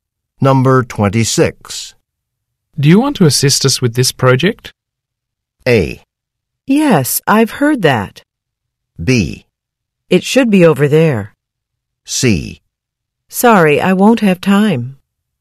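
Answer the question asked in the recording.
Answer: C: Sorry, I won't have time.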